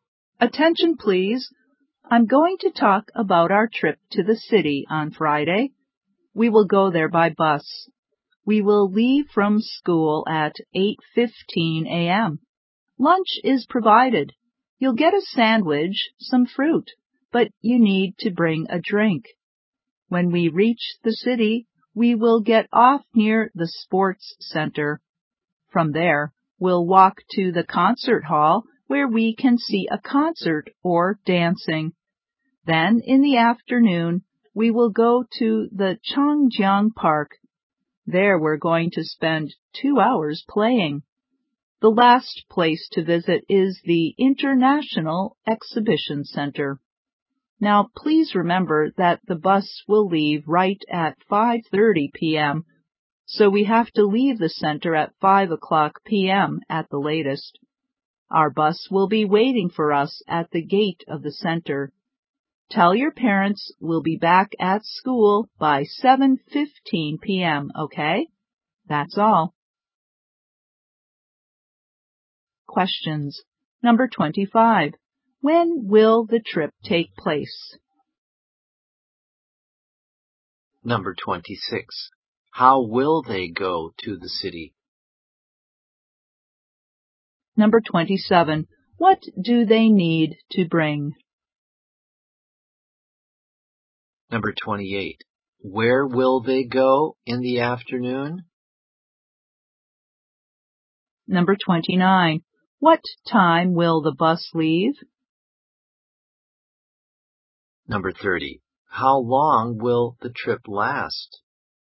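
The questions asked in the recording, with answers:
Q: When will the trip take place?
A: On Friday

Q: How will they go to the city?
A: By bus

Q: What do they need to bring?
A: A drink

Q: Where will they go in the afternoon?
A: Changjiang Park

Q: What time will the bus leave?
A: At 5:30 p.m.

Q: How long will the trip last?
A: 11 hours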